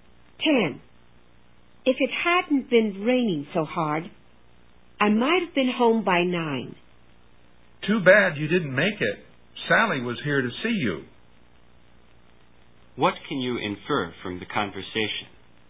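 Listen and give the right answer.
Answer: The speaker got home late because of the rain and missed Sally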